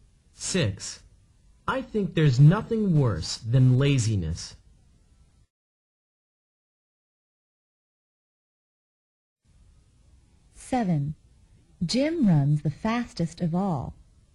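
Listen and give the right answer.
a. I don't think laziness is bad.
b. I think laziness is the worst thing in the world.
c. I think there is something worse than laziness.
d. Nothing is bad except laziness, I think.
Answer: b. I think laziness is the worst thing in the world.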